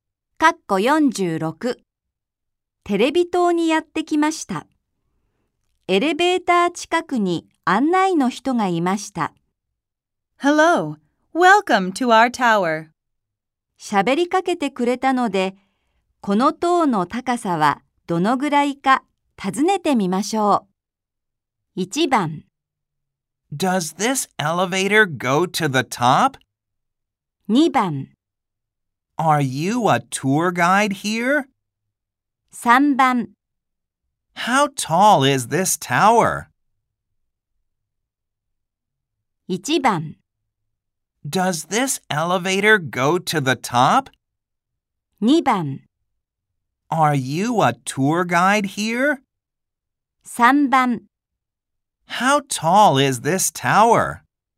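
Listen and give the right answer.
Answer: 3: How tall is this tower?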